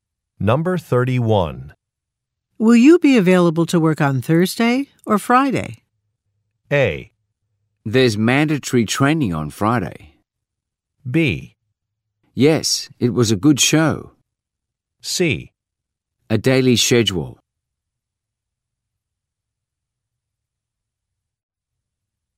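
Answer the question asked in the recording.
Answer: A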